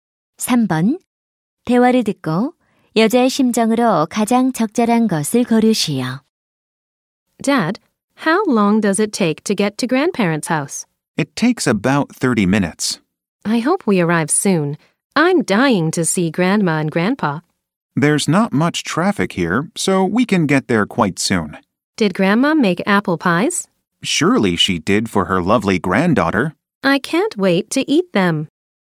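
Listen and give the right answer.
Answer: 신남/기대됨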